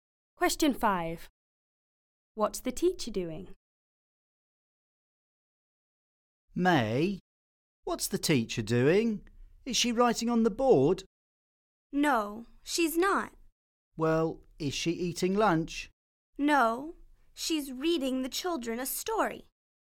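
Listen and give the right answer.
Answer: Reading the children a story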